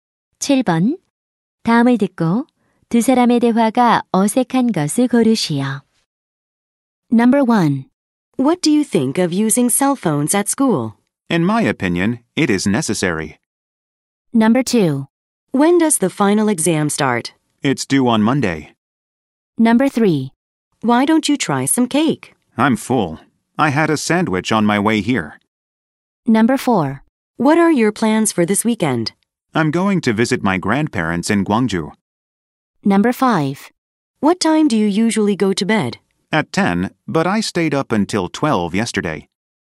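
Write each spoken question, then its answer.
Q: 다음을 듣고 두 사람의 대화가 어색한 것을 고르시오.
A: 2: When does the final exam start? It's due on Monday.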